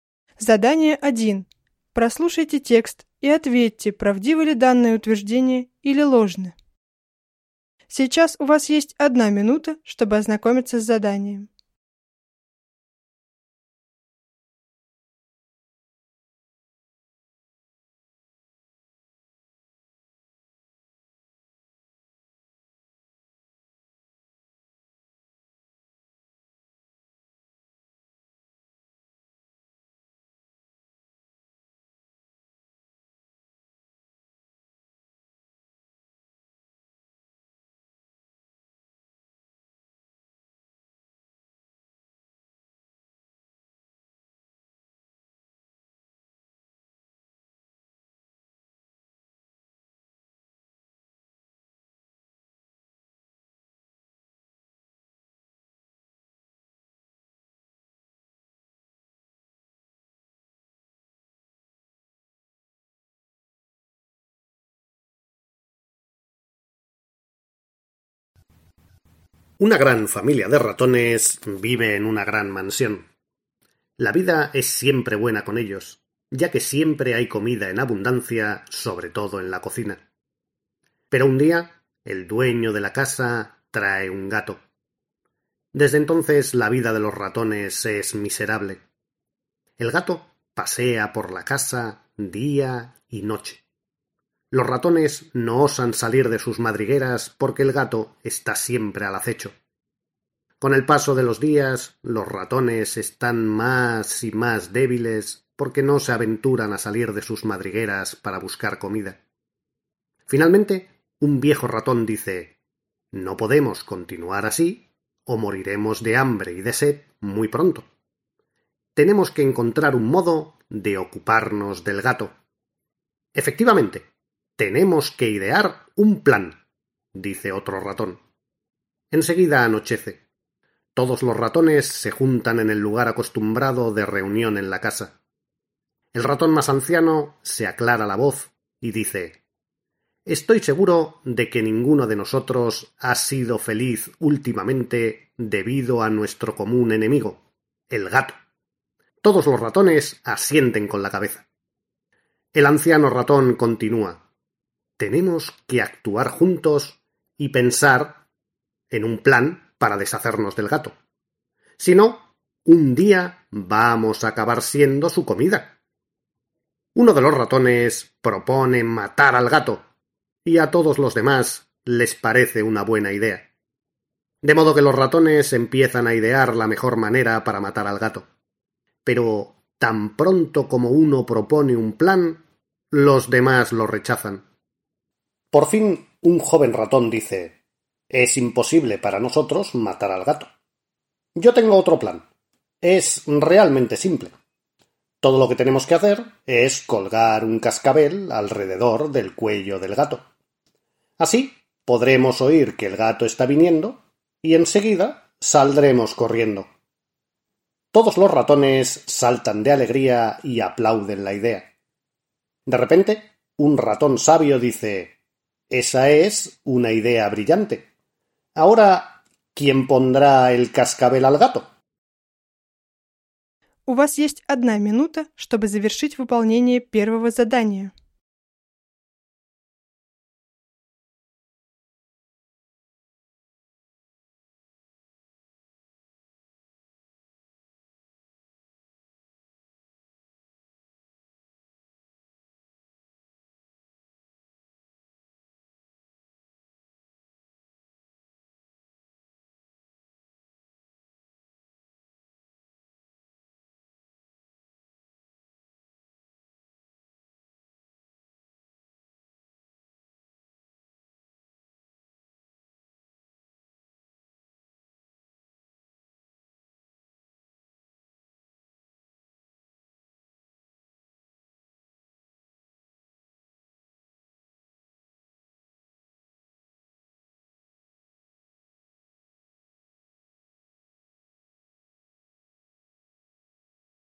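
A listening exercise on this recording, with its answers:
No 1-7. Прослушайте текст и ответьте на вопрос, правдивы ли данные утверждения или ложны (verdadero o falso).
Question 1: Una pequeña familia de ratones vive en una gran mansión.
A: falso

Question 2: Tienen mucha comida, sobre todo en la cocina.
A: verdadero

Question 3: Un día el dueño de la casa trae un perro.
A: falso

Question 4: El gato duerme día y noche.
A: falso

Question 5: Con el paso de los días los ratones se hacen débiles porque no se aventuran a salir para buscar comida.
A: verdadero

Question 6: Los ratones deciden encontrar un modo de deshacerse del gato.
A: verdadero

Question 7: El anciano ratón dice que si no encuentran un plan acabarán siendo la comida del gato.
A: verdadero

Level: 4-5 класс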